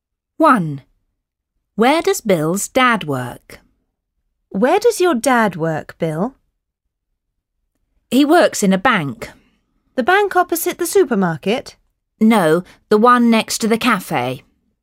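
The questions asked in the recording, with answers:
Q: Where does Bill's dad work?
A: in the bank next to the cafe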